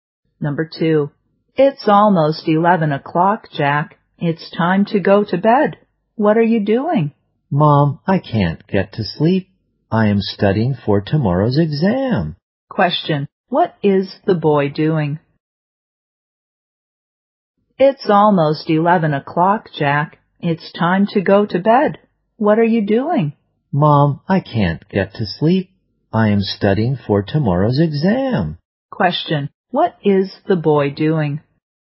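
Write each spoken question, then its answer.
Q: what is the boy doing?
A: Studying for tomorrow's exam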